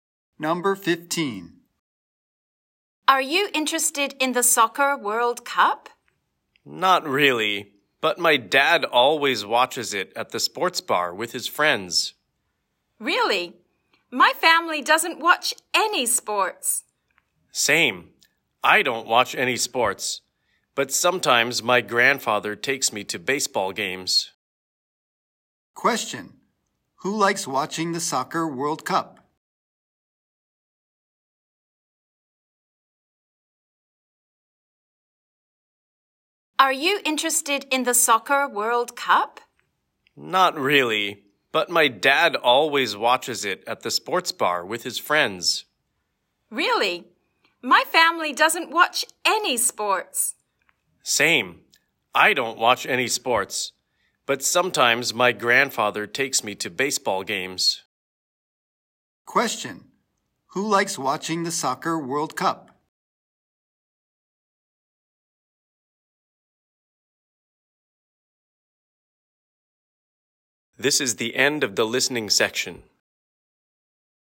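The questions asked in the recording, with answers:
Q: Who likes watching the Soccer World Cup?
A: The boy's dad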